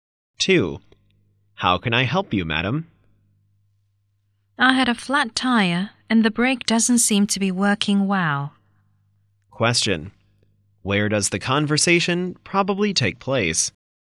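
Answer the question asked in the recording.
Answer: At a garage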